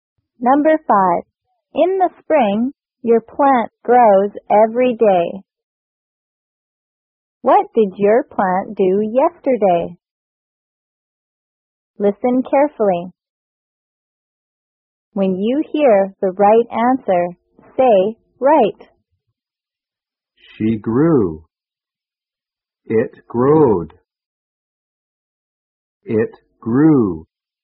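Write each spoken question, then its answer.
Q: What did your plant do yesterday?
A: It grew.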